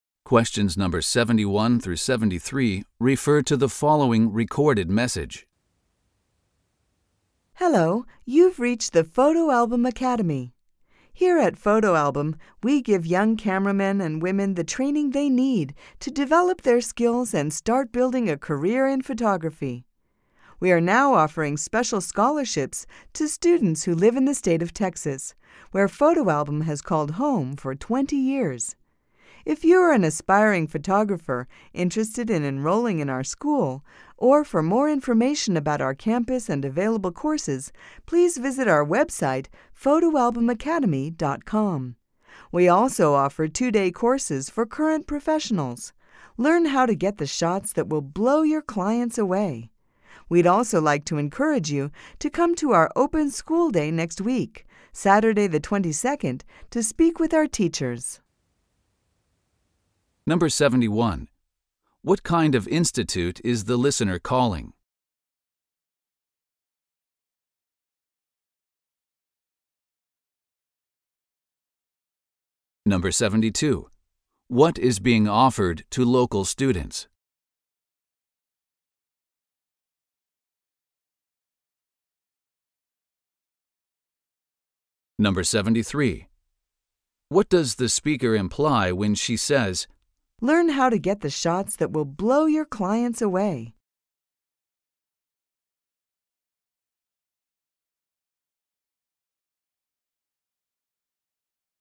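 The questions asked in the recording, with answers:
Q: What kind of institute is the listener calling?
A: A photography school

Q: What is being offered to local students?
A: Special scholarships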